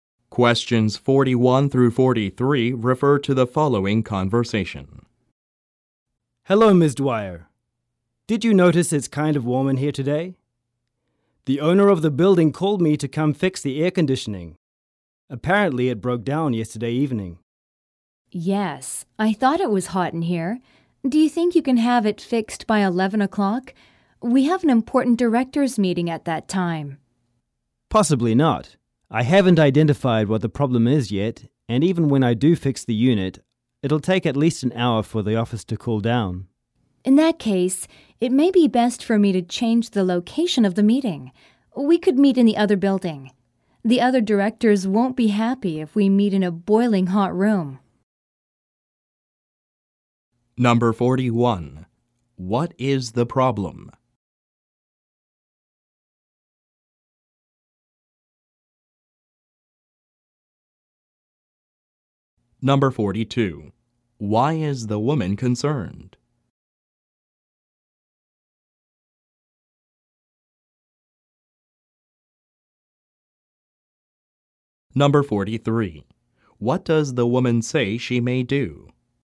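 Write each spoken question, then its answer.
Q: What is the problem?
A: The air conditioning is broken.

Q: Why is the woman concerned?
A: She has an important directors' meeting at 11 o'clock.

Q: What does the woman say she may do?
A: Change the location of the meeting.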